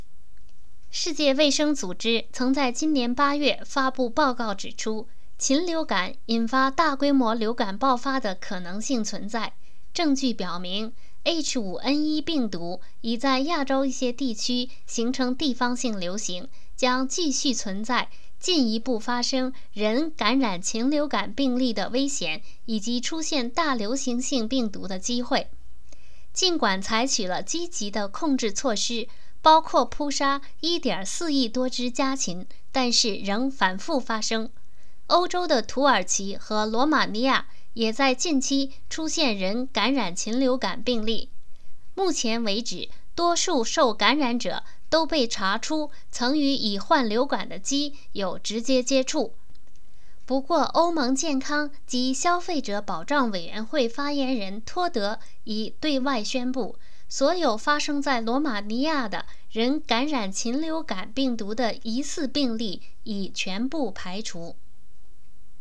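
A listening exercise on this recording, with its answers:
Please answer the following questions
到目前为止,什么人容易感染禽流感?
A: 与已患流感的鸡有直接接触的人

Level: 3rd Year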